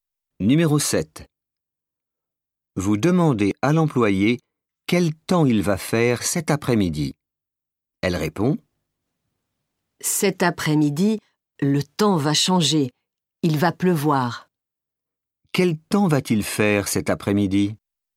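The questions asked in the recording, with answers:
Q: Quel temps va-t-il faire cet après-midi?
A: Il va pleuvoir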